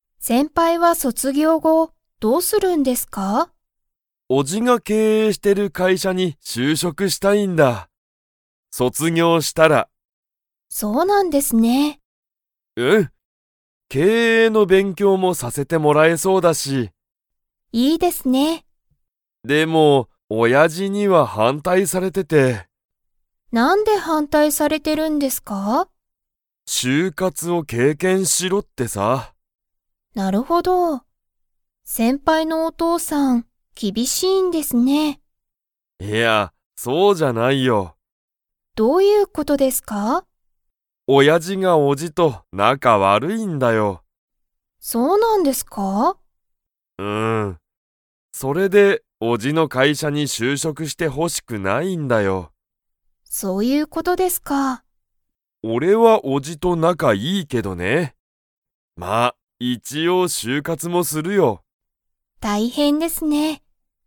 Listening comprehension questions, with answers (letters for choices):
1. 卒業そつぎょう後ご、富山とやまさんは誰だれの会社かいしゃに就職しゅうしょくしたいですか?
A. お父とうさん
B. お母かあさん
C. おじ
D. おば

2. 富山とやまさんのお父とうさんとおじは仲なかが 。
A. いい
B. 悪わるい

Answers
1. C
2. B

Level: Level 4